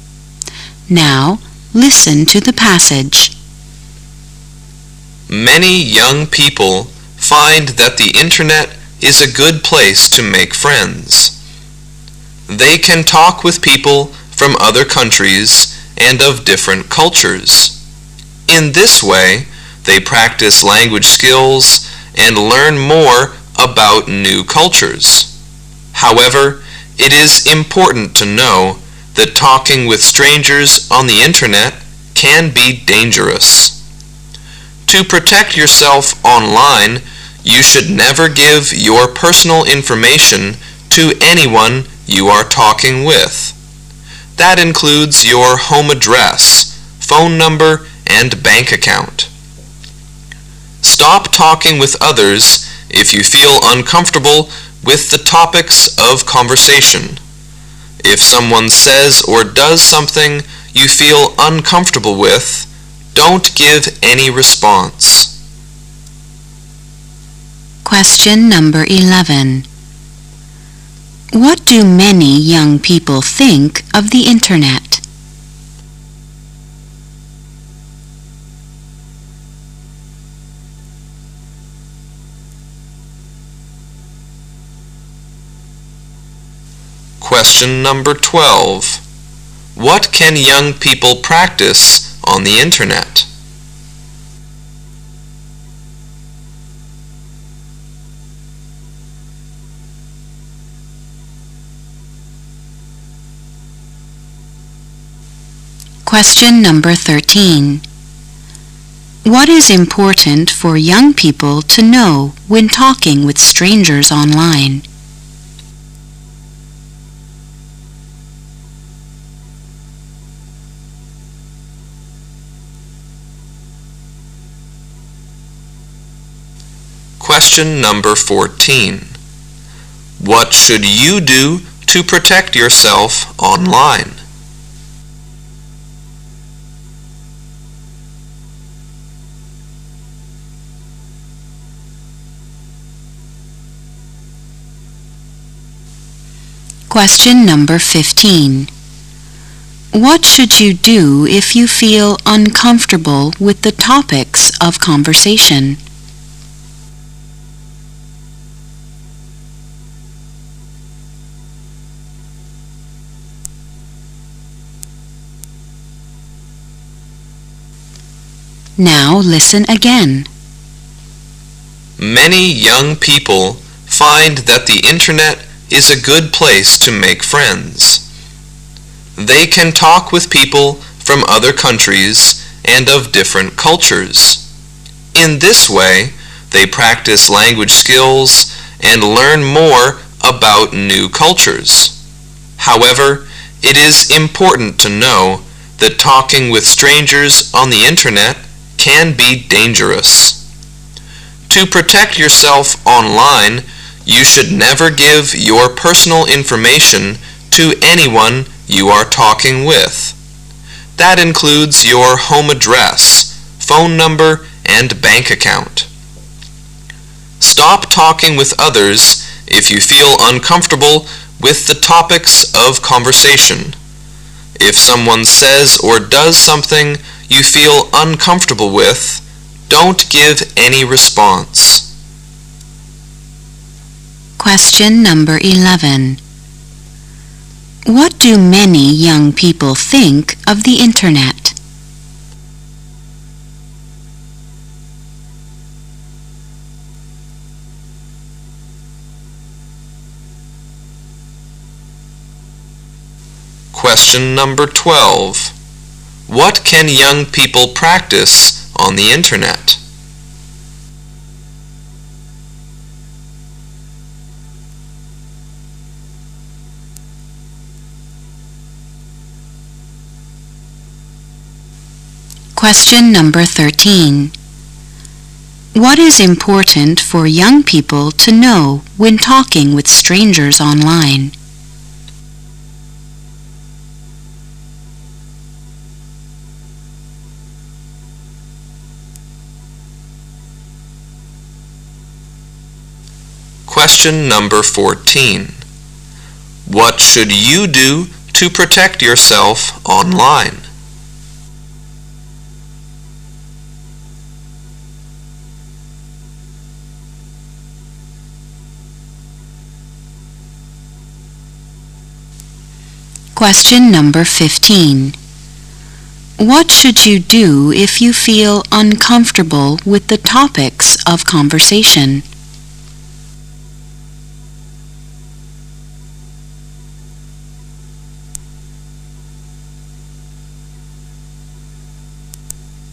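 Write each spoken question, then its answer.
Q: What do many young people think of the internet?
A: A good place to make friends

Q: What can young people practice on the internet?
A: Language skills

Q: What is important for young people to know when talking with strangers online?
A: It can be dangerous

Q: What should you do to protect yourself online?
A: Never give personal information

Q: What should you do if you feel uncomfortable with the topics of conversation?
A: Stop talking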